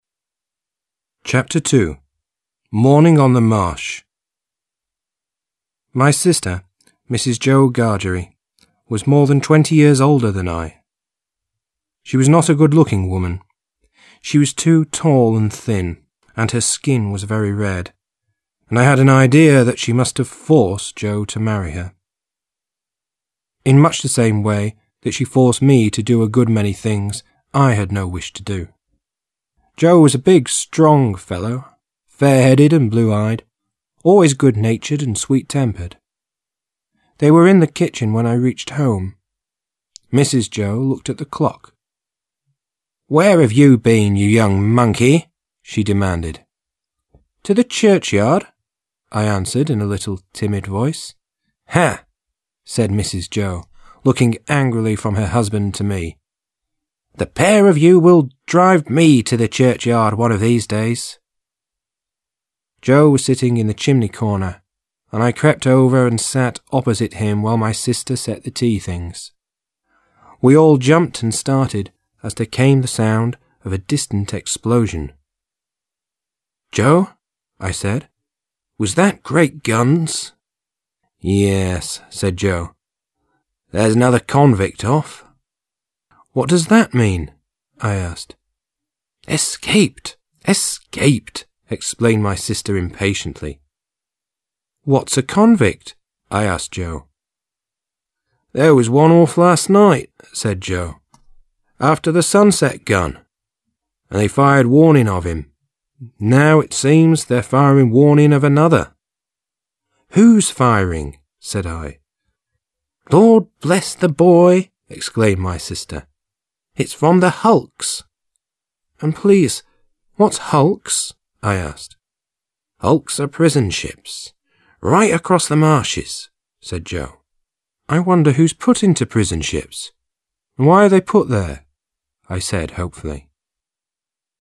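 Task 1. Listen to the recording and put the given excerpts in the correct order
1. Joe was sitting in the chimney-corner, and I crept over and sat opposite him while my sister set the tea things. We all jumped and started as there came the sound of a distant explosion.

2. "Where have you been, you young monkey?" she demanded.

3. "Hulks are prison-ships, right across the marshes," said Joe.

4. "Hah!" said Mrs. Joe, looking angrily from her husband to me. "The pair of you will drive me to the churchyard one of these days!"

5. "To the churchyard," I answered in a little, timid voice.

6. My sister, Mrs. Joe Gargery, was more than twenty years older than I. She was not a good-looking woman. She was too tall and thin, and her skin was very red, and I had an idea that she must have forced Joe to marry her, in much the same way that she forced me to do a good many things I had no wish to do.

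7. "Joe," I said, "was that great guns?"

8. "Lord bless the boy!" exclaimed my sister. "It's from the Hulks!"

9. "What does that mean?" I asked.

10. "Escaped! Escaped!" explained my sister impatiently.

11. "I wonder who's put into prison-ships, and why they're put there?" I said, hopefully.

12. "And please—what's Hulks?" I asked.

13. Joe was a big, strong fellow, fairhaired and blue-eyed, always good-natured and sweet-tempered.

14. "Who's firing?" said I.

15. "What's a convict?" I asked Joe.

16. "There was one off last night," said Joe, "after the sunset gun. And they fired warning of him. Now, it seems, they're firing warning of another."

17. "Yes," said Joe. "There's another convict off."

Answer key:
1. 6
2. 3
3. 16
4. 5
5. 4
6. 1
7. 7
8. 14
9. 9
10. 10
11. 17
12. 15
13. 2
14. 13
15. 11
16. 12
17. 8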